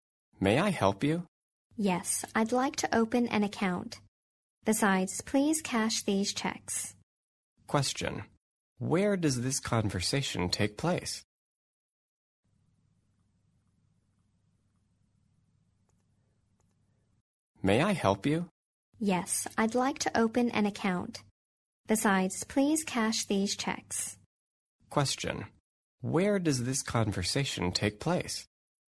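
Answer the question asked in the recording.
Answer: At a bank.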